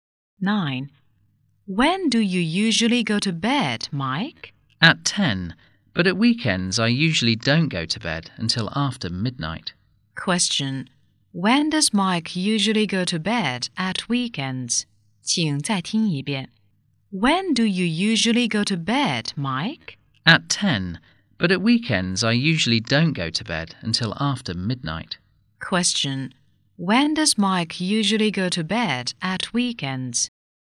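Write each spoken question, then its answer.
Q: When does Mike usually go to bed at weekends?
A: After midnight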